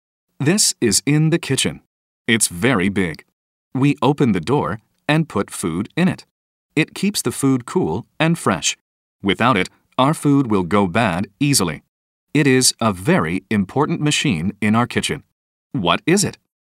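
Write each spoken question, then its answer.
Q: What is it?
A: a refrigerator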